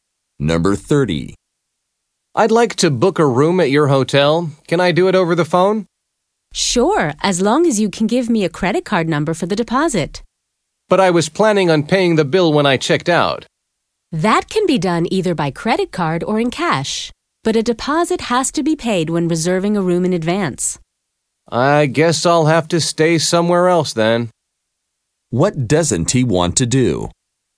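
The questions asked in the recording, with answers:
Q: What doesn't he want to do?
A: Pay a deposit by credit card when booking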